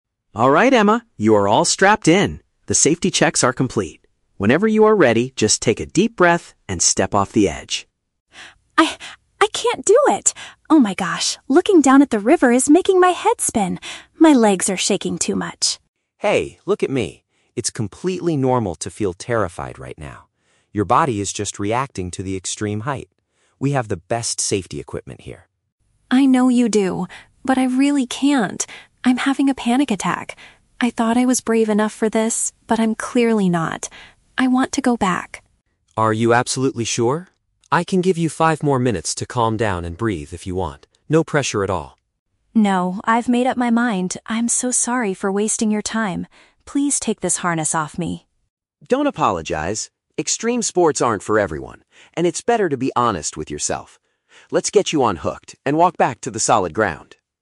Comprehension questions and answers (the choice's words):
Listen to the conversation between a customer and a bungee jumping instructor. Choose the correct answer (A, B, or C) for each question.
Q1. What is the main reason Emma decides not to jump?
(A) She believes the safety equipment is not securely attached.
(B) She is suffering from an intense fear of the height.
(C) She feels sick because the wind on the bridge is too strong.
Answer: She is suffering from an intense fear of the height.

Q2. How does the instructor initially respond when Emma wants to quit?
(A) He gets annoyed because she is wasting his time.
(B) He tries to physically push her off the edge of the bridge.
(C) He offers her a little extra time to relax before deciding.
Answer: He offers her a little extra time to relax before deciding.

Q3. What happens at the end of the conversation?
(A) They remove the safety gear and return to a safe area.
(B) Emma agrees to jump after resting for five minutes.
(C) Emma decides to jump together with the instructor.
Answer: They remove the safety gear and return to a safe area.

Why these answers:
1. Emma says, "looking down at the river is making my head spin" and she is having a "panic attack." Jake also mentions she is reacting to the "extreme height." This perfectly matches option B: an intense fear of the height.
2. When Emma says she wants to go back, Jake says, "I can give you five more minutes to calm down and breathe if you want." This means he offers her extra time to relax.
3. Emma says, "Please take this harness off me," and Jake agrees: "Let's get you unhooked and walk back to the solid ground." "Unhooked" means removing the safety gear, and "solid ground" is a safe area.

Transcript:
You are all strapped in. The safety checks are complete. Whenever you are ready, just take a deep breath and step off the edge.
Emma: I... I can't do it. Oh my gosh, looking down at the river is making my head spin. My legs are shaking too much.
Jake: Hey, look at me. It's completely normal to feel terrified right now. Your body is just reacting to the extreme height. We have the best safety equipment here.
Emma: I know you do, but I really can't. I'm having a panic attack. I thought I was brave enough for this, but I'm clearly not. I want to go back.
Jake: Are you absolutely sure? I can give you five more minutes to calm down and breathe if you want. No pressure at all.
Emma: No, I've made up my mind. I'm so sorry for wasting your time. Please take this harness off me.
Jake: Don't apologize! Extreme sports aren't for everyone, and it's better to be honest with yourself. Let's get you unhooked and walk back to the solid ground.